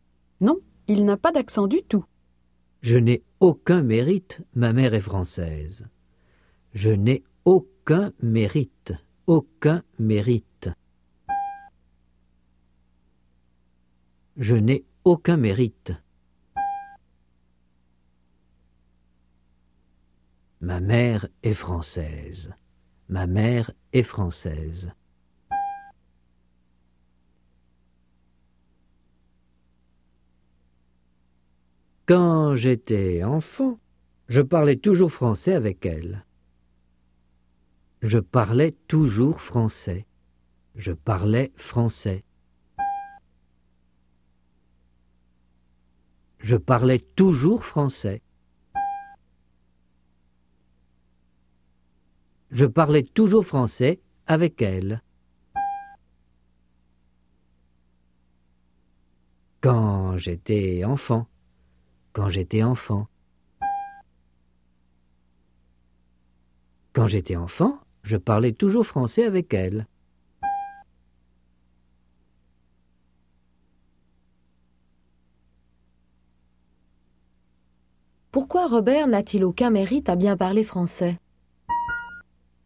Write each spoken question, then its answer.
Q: Pourquoi Robert n'a-t-il aucun mérite à bien parler français?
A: Parce que sa mère est française.